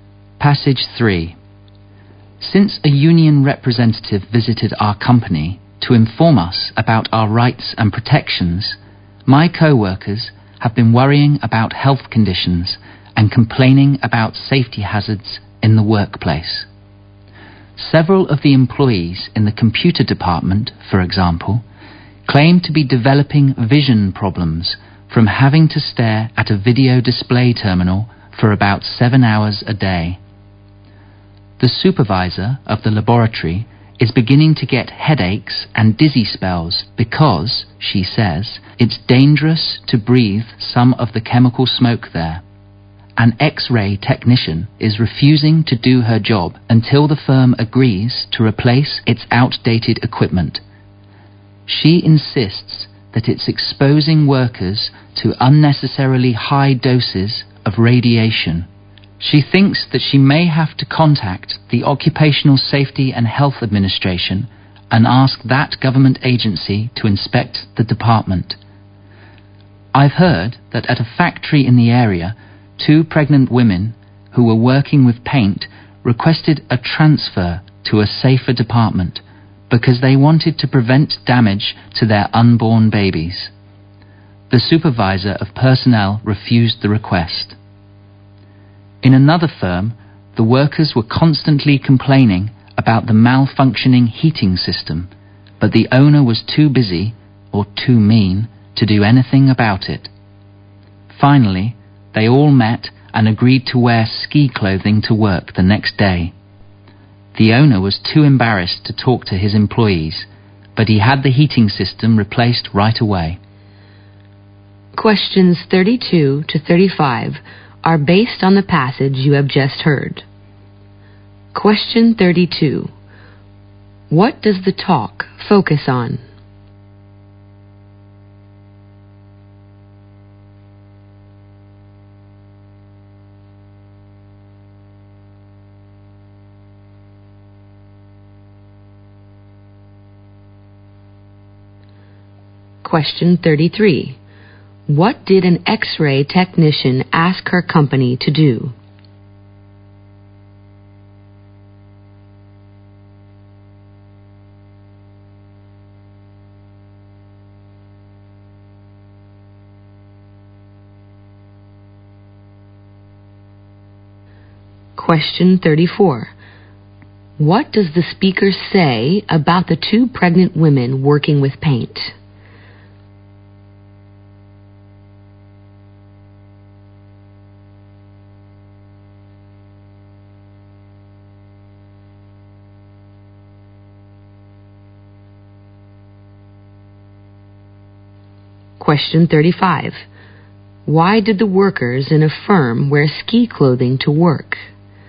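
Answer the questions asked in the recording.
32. Health and safety hazards at work.
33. Replace its outdated equipment.
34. They asked for a transfer to a safer department, but it was refused.
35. To protest the broken heating system.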